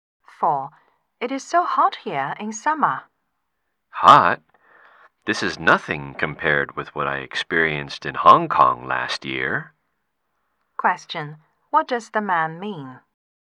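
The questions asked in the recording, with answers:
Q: what does the man mean?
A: It was much hotter in Hong Kong last year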